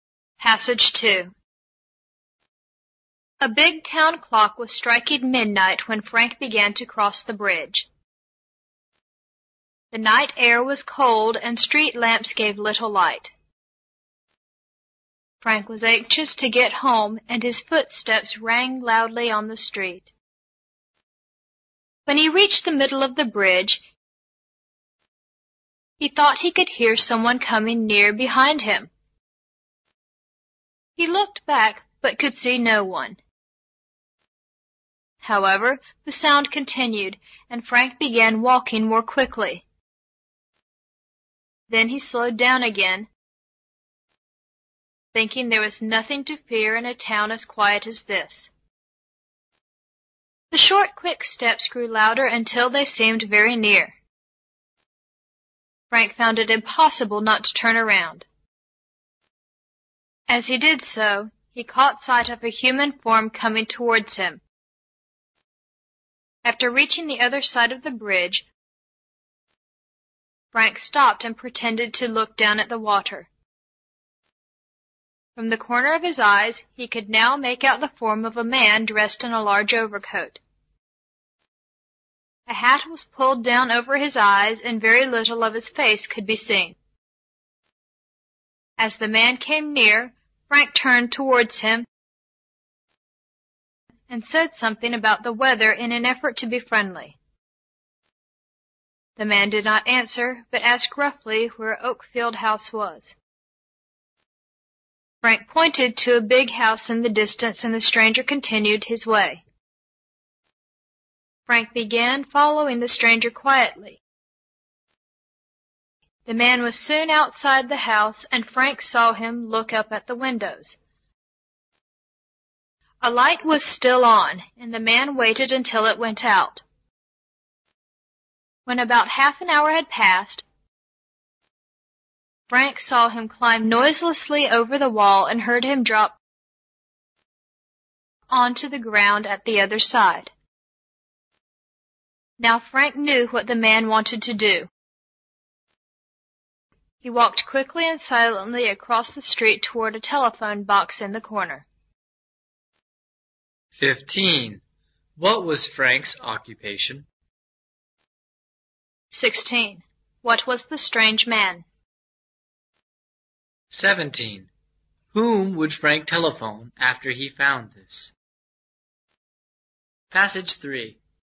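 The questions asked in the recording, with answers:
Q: What was the strange man?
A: A thief

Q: Whom would Frank telephone after he found this?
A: The police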